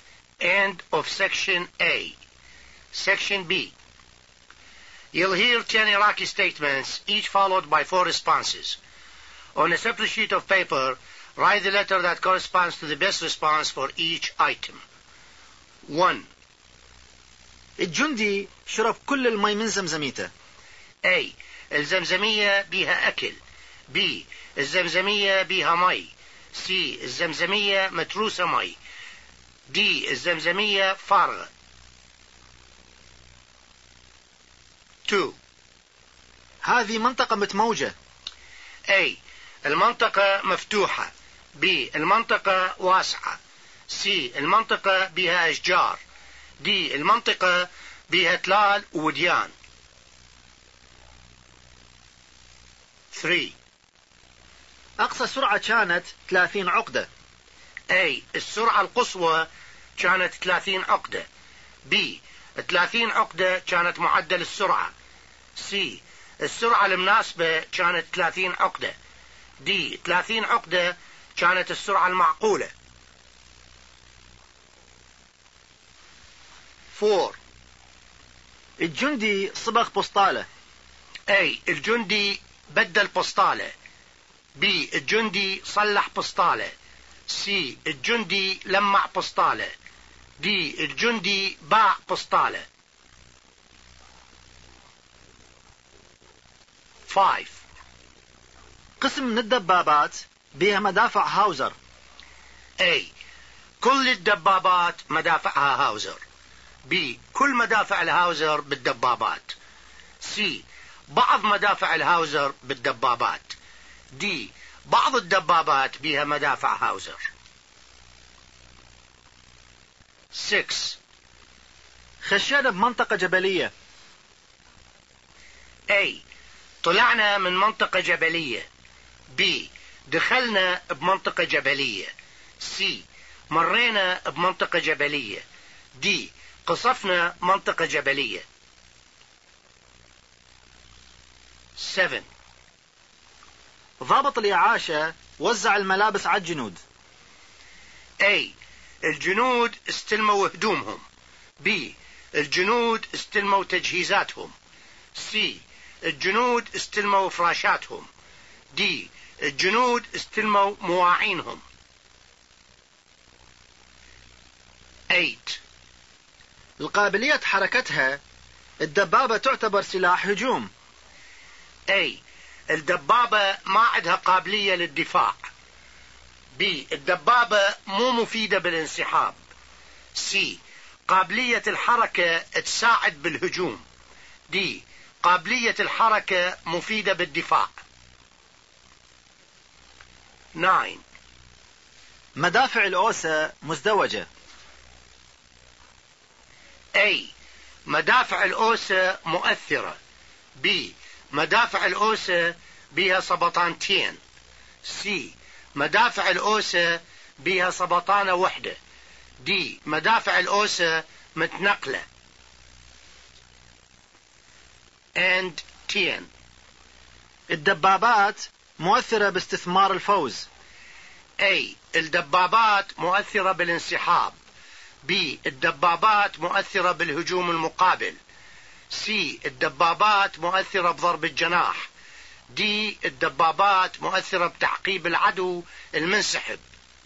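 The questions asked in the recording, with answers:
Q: الجندي شرب كل المي من زمزميته.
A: D: الزمزمية فارغة.

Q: هذه منطقة متموجة.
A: D: المنطقة بها تلال ووديان.

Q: أقصى سرعة كانت 30 عقدة.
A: A: السرعة القصوى كانت 30 عقدة.

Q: الجندي صبغ بوستالة.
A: C: الجندي لمع بوستالة.

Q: قسم من الدبابات بها مدافع هاوزر.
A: D: بعض الدبابات بها مدافع هاوزر.

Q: خشينا بمنطقة جبلية.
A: B: دخلنا بمنطقة جبلية.

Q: ضابط الإعاشة وزع الملابس على الجنود.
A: A: الجنود استلموا هدومهم.

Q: القابلية حركتها الدبابة تعتبر سلاح هجوم.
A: C: قابلية الحركة تساعد بالهجوم.

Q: مدافع الأوسة مزدوجة.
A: B: مدافع الأوسة بها سبطانتين.

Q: الدبابات مؤثرة باستثمار الفوز.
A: D: الدبابات مؤثرة بتعقيب العدو المنسحب.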